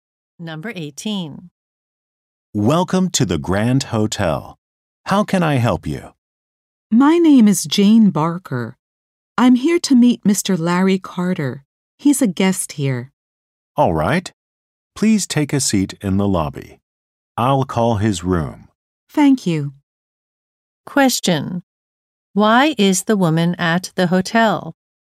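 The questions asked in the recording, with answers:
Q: Why is the woman at the hotel?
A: To meet a guest, Mr. Larry Carter.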